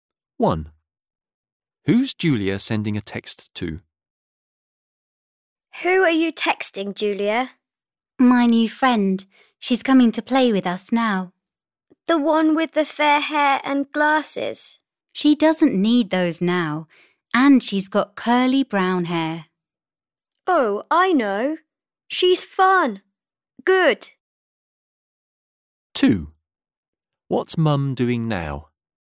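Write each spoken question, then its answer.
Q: Who's Julia sending a text to?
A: Her new friend, who has curly brown hair and no glasses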